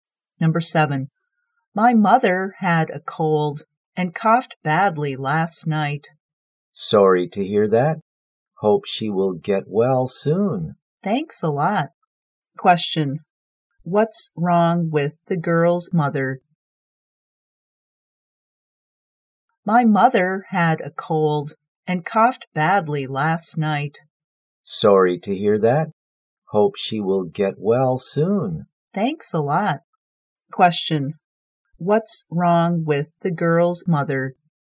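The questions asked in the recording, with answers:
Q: what's wrong with the girl's mother?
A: She had a cold and coughed badly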